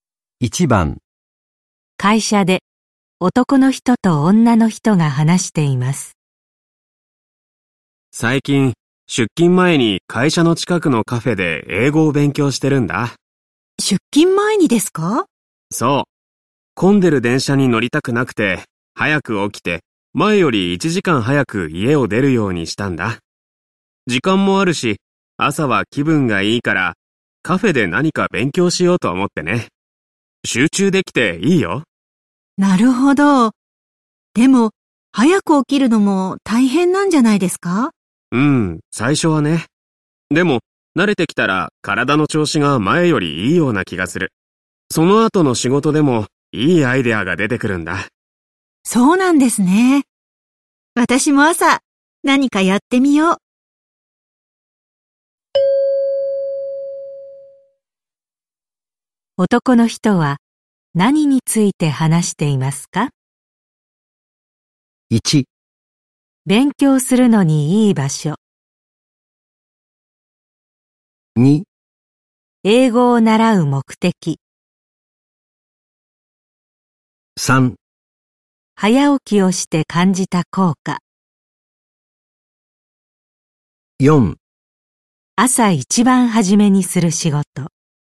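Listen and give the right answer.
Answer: 3: 早起きをして感じた効果。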